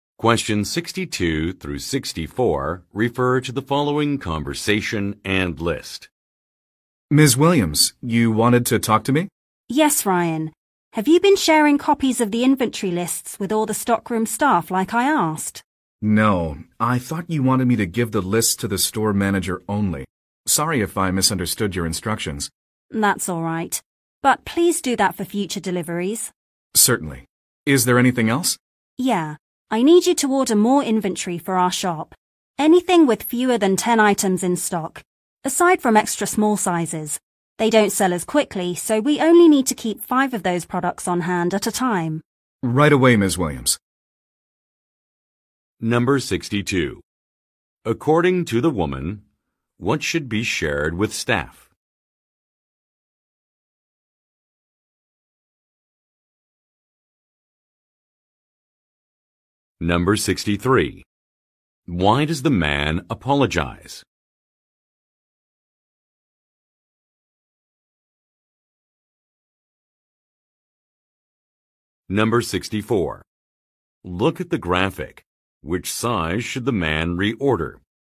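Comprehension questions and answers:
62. According to the woman, what should be shared with staff?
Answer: Copies of a document

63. Why does the man apologize?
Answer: He misunderstood directions.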